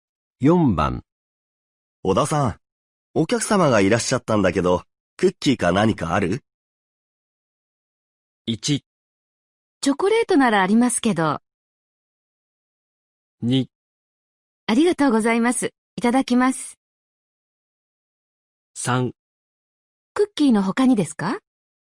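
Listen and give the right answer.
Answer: 1: チョコレートならありますけど。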